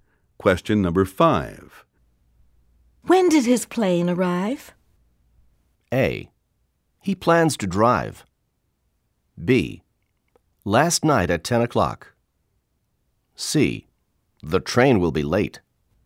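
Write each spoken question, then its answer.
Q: When did his plane arrive?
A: B: Last night at 10 o'clock.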